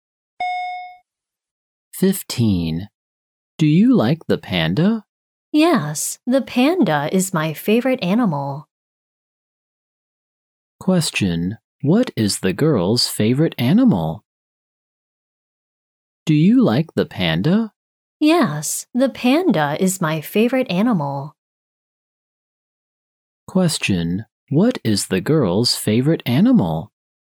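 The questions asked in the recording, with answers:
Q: What is the girl's favorite animal?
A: The panda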